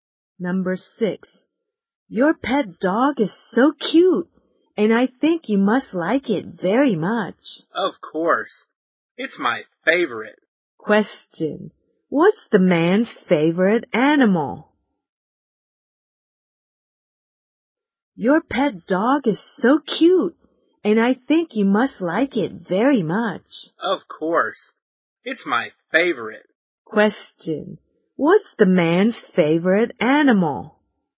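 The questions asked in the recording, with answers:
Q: What's the man's favorite animal?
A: His pet dog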